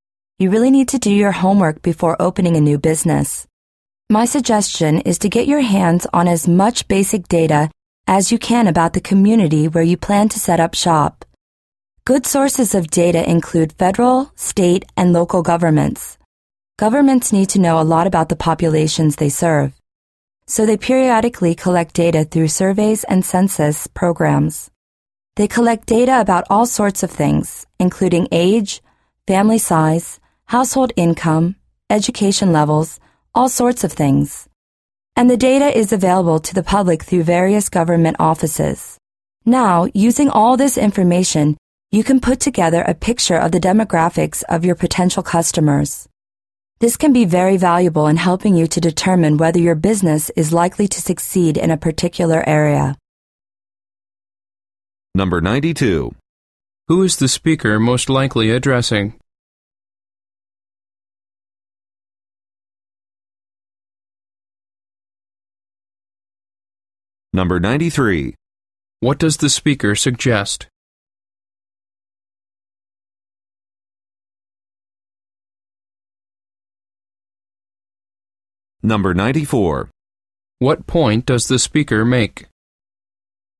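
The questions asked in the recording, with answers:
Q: Who is the speaker most likely addressing?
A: People planning to open a new business

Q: What does the speaker suggest?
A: Gathering basic data about the community where the business will be set up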